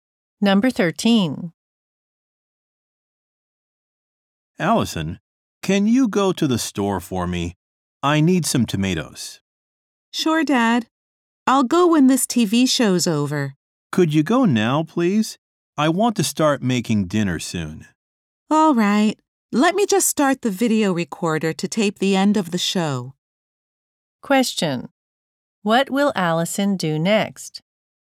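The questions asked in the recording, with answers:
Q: What will Allison do next?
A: Record the show and go to the store for tomatoes.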